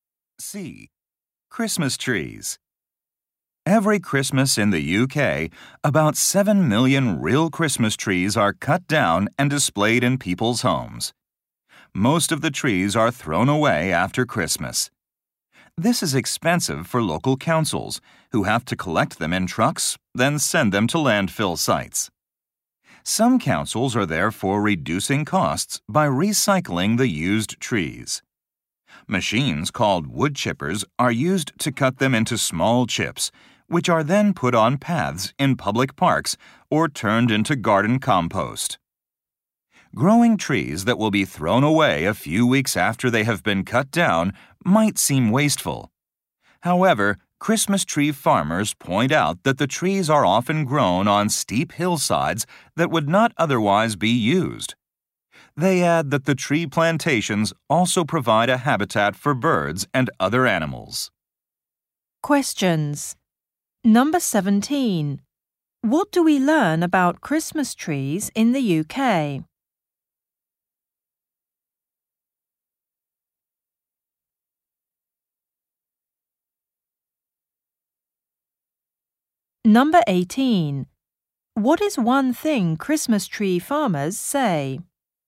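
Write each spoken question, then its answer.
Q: What do we learn about Christmas trees in the UK?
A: Some councils recycle used trees to reduce costs.

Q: What is one thing Christmas tree farmers say?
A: The trees grow on land that would otherwise not be used and provide wildlife habitat.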